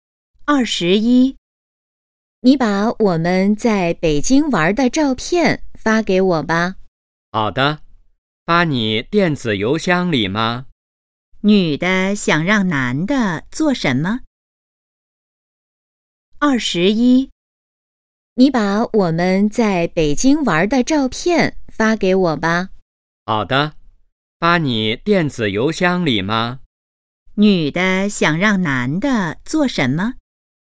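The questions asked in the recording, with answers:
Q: 女的想让男的做什么?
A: 把在北京玩的照片发给她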